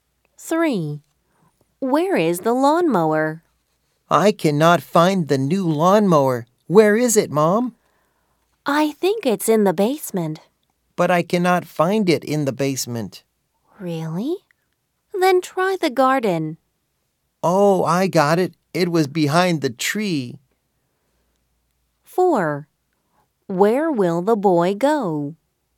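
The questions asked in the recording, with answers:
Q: Where is the lawnmower?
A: In the garden, behind the tree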